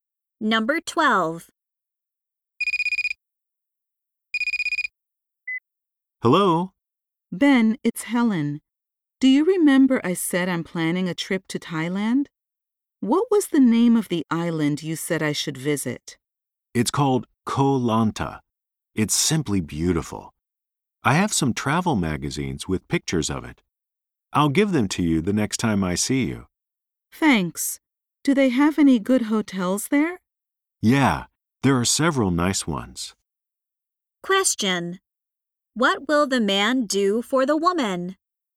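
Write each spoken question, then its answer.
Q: What will the man do for the woman?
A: Give her travel magazines with pictures of the island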